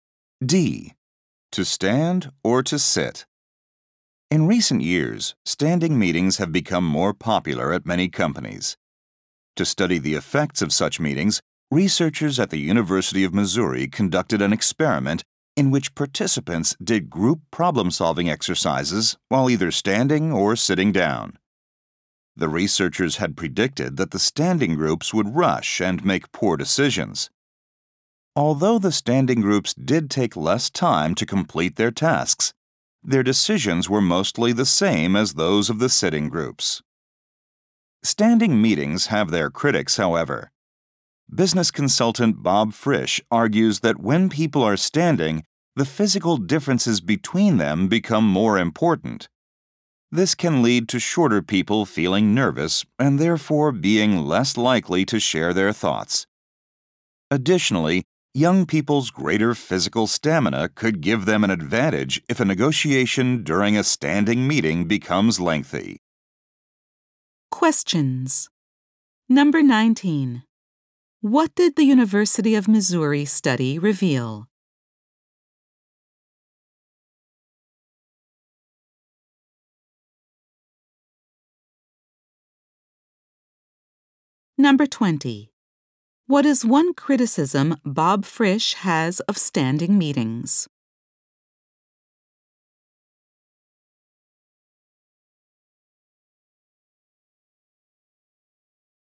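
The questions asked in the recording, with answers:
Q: What did the University of Missouri study reveal?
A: Standing groups finished faster but made mostly the same decisions

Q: What is one criticism Bob Frisch has of standing meetings?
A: Physical differences matter more, so shorter people may be less likely to share thoughts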